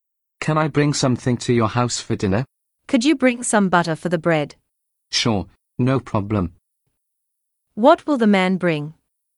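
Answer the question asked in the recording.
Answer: Butter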